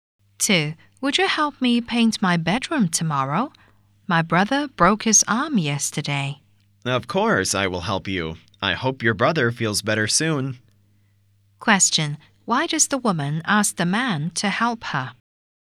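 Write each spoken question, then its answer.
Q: Why does the woman ask the man to help her?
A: Her brother broke his arm.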